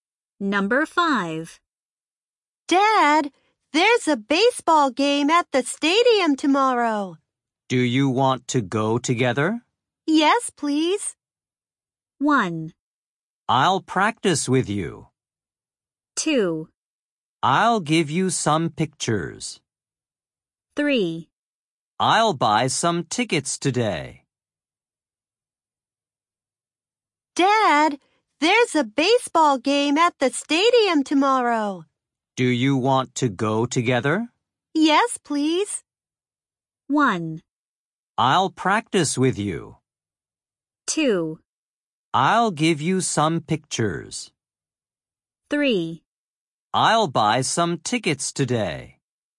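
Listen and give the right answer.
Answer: 3: I'll buy some tickets today.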